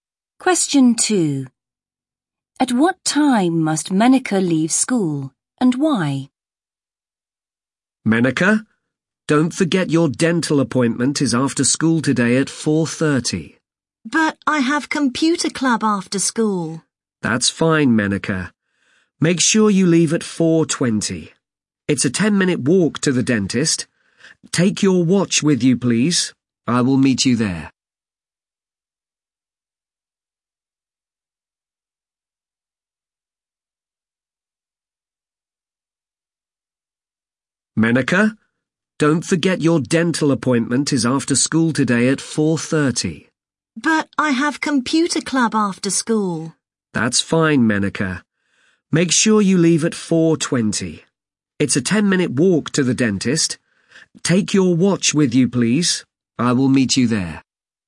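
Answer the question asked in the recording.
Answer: At 4:20, because it's a 10-minute walk to her 4:30 dental appointment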